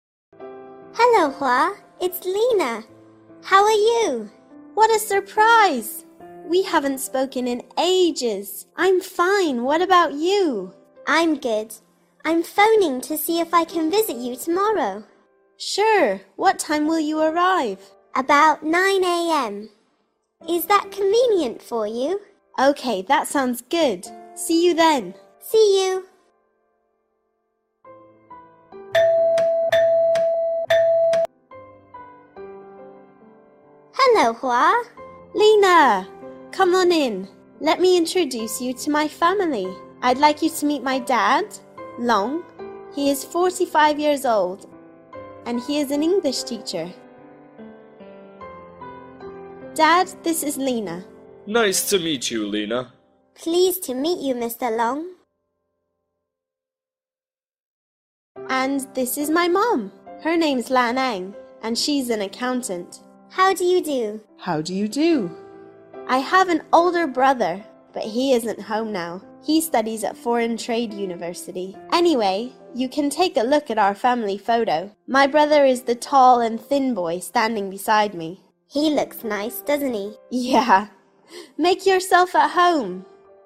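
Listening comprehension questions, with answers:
Task: Answer the questions briefly.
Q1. Who visits Hoa's family?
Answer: Lina

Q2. What is Hoa's father's job?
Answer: An English teacher

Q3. What does Hoa's mother do?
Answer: She is an accountant

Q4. Where does Hoa's brother study?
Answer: At Foreign Trade University

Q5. What is Hoa's brother like in the photo?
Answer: Tall and thin

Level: lớp 8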